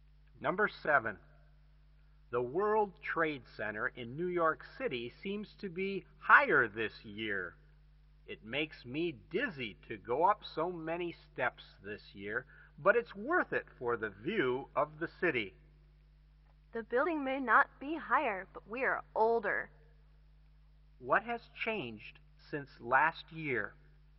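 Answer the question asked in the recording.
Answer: They have got older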